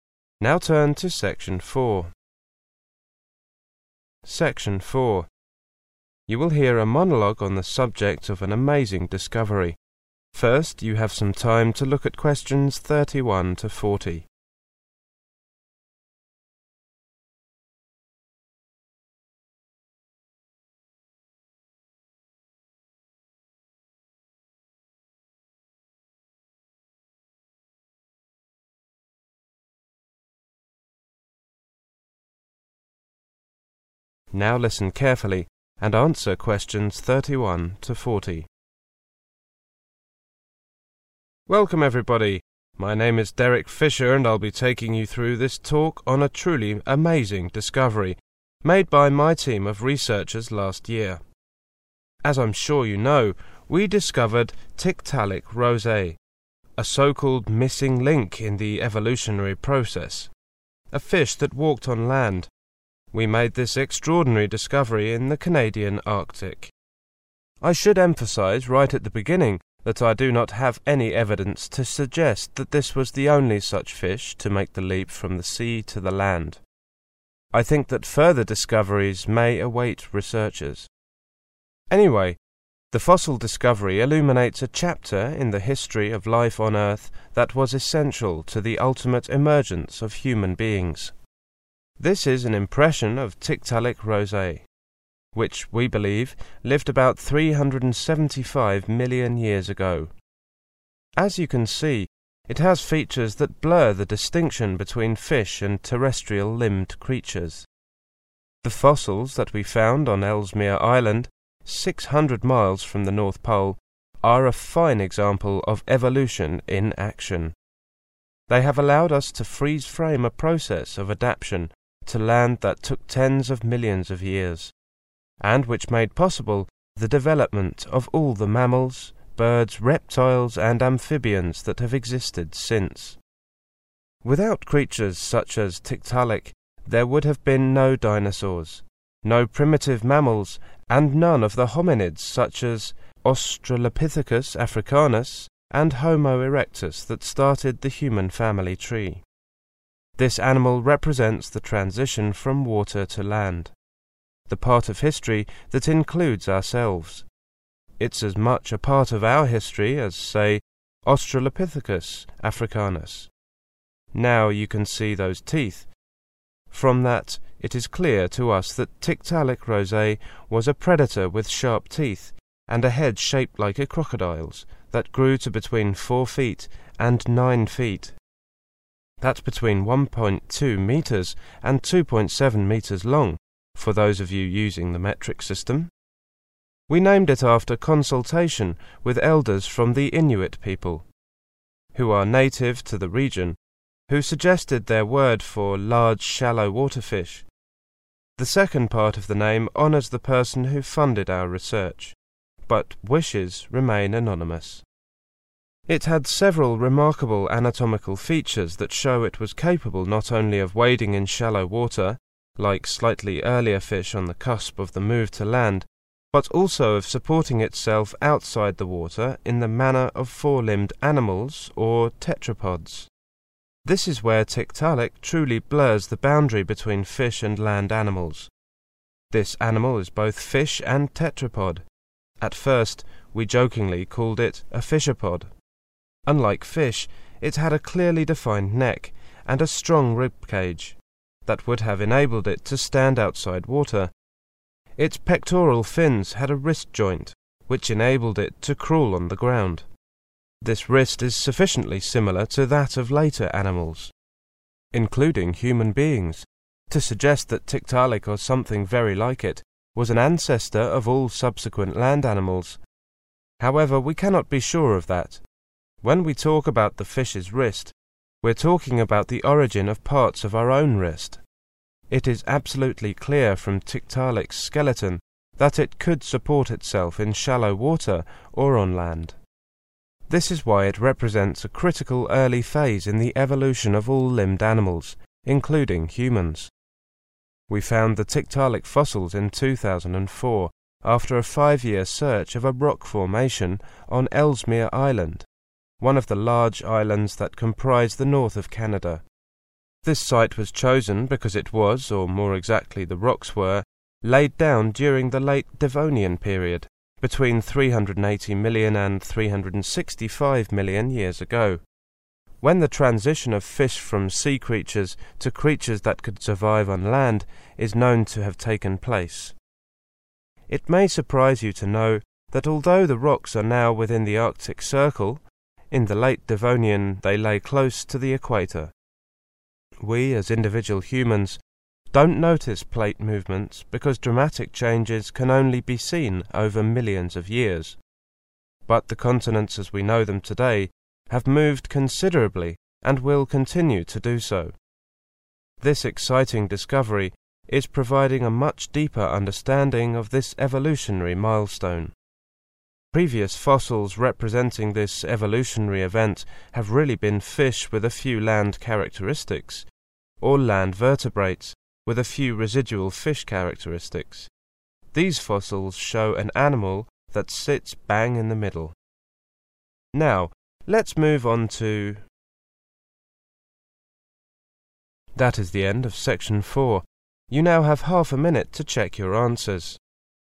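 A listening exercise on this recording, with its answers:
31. Tiktaalik roseae is considered to be an evolutionary ___________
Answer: missing link

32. Tiktaalik roseae lived around ___________ago.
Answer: 375 million years

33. The remains of the Tiktaalik roseae were found 600 miles from the ___________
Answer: North Pole

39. How long had the researchers been looking when they found the Tiktaalik remains?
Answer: 5 years

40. Where were the Late Devonian rocks originally created?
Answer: close to the equator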